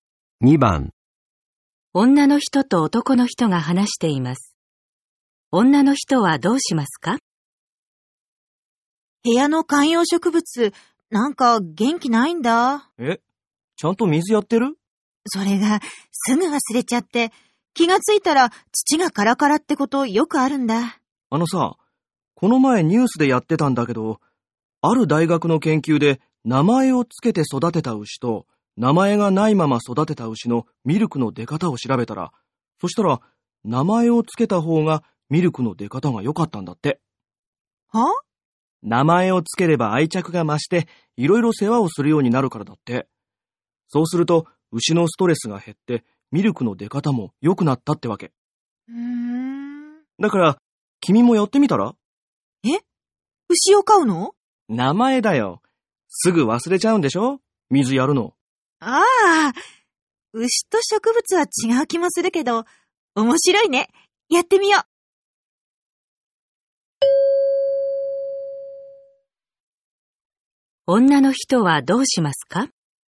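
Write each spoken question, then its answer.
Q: 女の人はどうしますか?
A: 観葉植物に名前をつける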